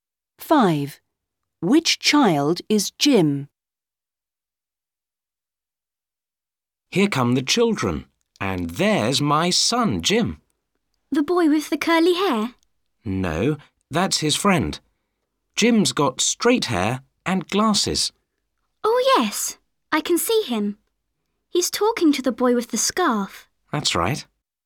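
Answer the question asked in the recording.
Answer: The boy with straight hair and glasses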